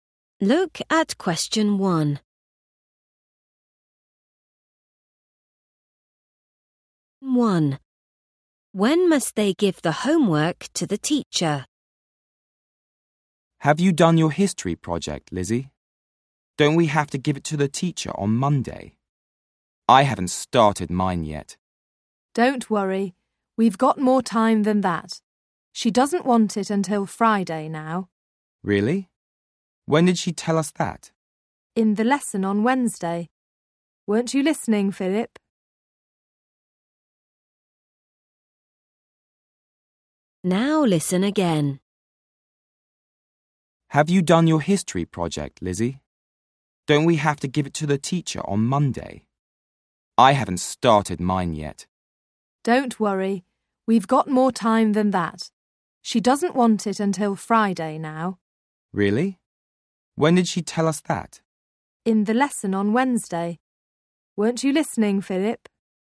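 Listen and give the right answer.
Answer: Friday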